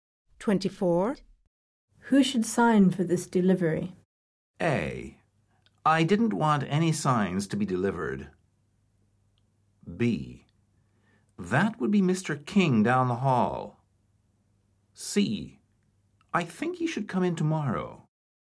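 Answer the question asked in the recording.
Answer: B: That would be Mr. King down the hall.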